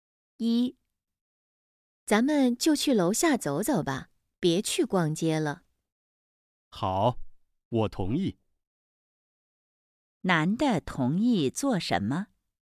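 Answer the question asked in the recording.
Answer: 去楼下走走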